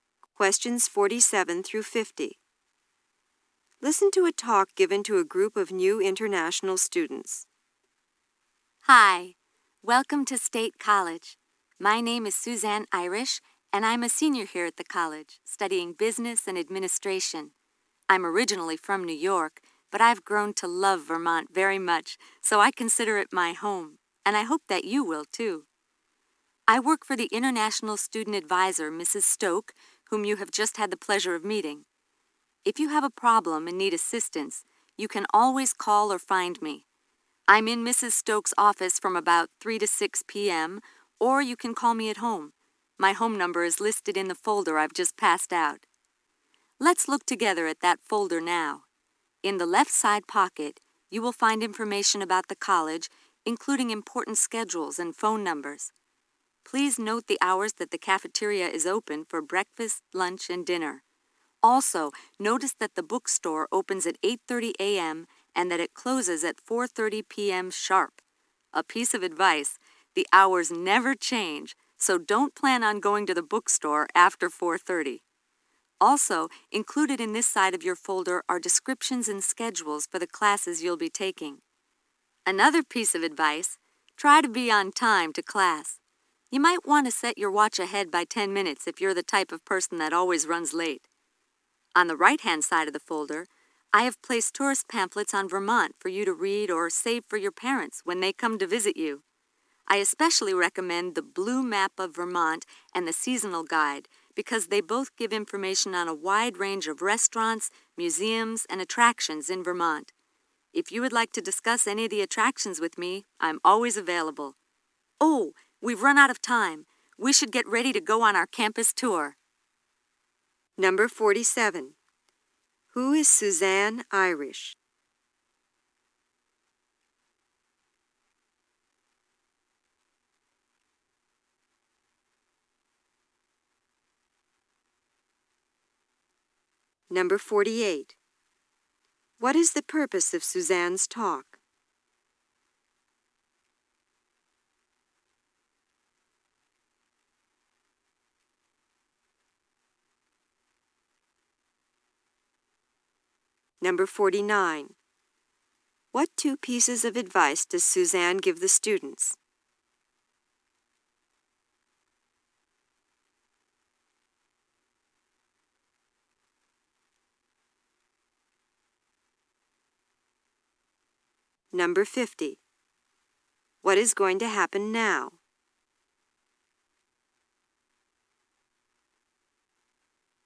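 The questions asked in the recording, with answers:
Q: Who is Suzanne Irish?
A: A senior who works for the international student advisor.

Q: What is the purpose of Suzanne's talk?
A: To welcome new international students and go over the information folder.

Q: What two pieces of advice does Suzanne give the students?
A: Don't go to the bookstore after 4:30, and be on time to class.

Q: What is going to happen now?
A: They will go on a campus tour.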